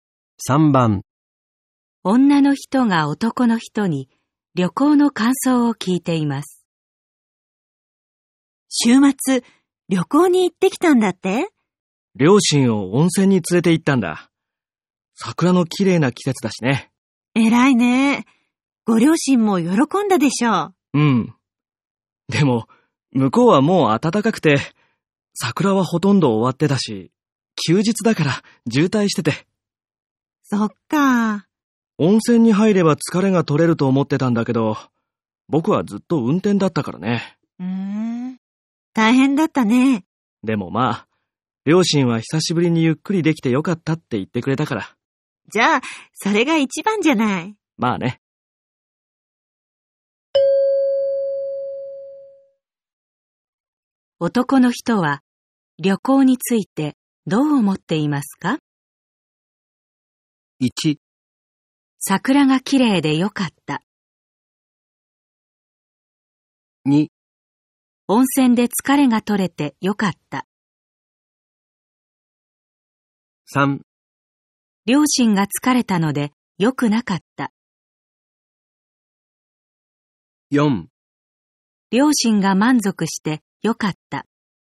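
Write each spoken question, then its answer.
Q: 男の人は旅行についてどう思っていますか?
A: 4: 両親が満足してよかった。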